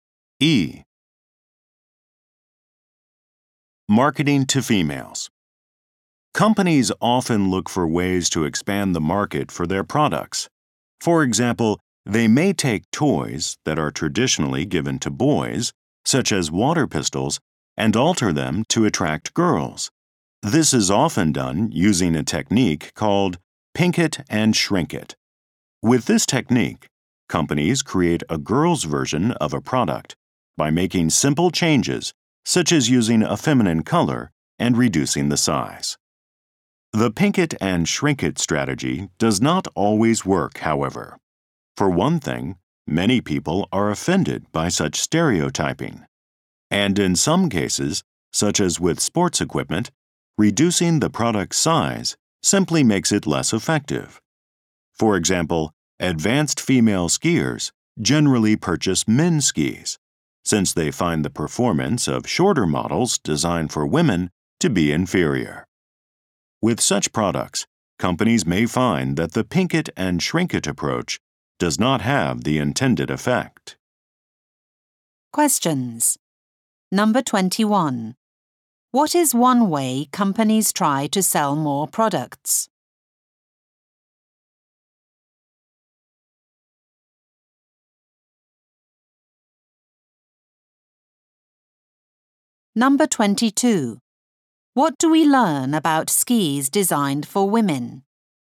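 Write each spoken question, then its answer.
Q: What is one way companies try to sell more products?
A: Changing boys' toys to attract girls, for example by making them pink and smaller.

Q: What do we learn about skis designed for women?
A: Their shorter length makes them perform worse, so advanced female skiers buy men's skis.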